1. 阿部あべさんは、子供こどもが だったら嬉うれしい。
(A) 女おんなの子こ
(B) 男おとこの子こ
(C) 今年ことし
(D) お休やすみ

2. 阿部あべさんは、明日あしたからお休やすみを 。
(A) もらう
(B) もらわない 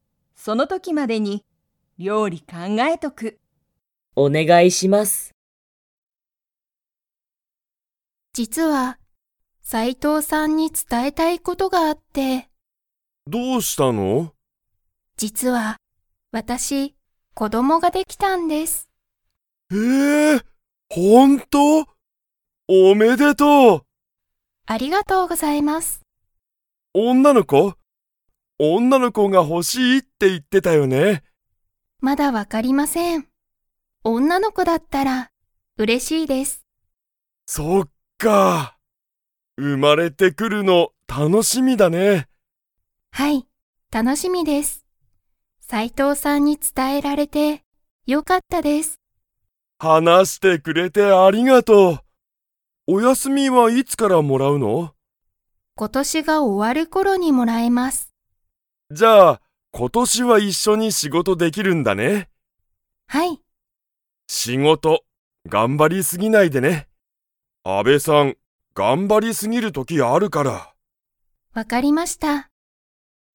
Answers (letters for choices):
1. A
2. B

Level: Level 3